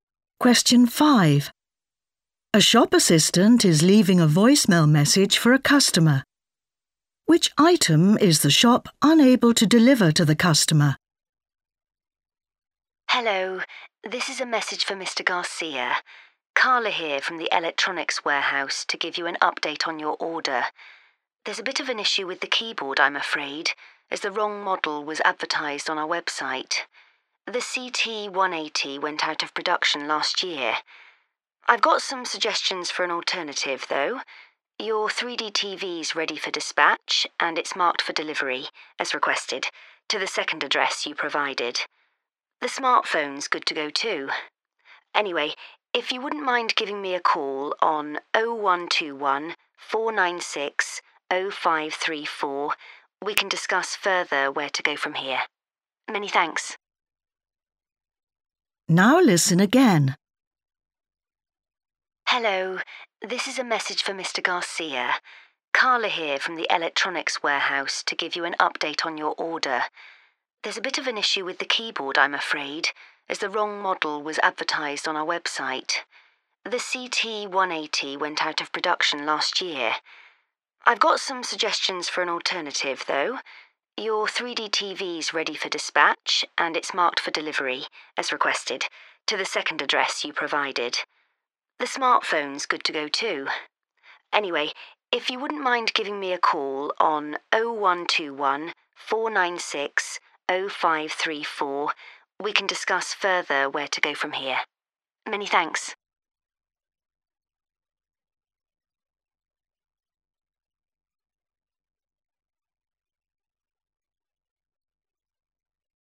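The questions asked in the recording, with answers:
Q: Which item is the shop unable to deliver to the customer?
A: The keyboard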